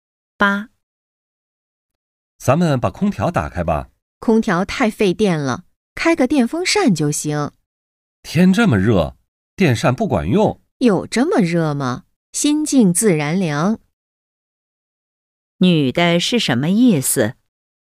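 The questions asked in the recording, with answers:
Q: 女的是什么意思?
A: 不用开空调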